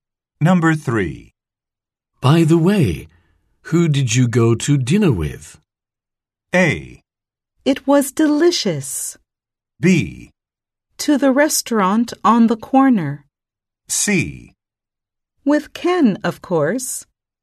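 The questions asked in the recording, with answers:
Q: By the way, who did you go to dinner with?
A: C: With Ken, of course.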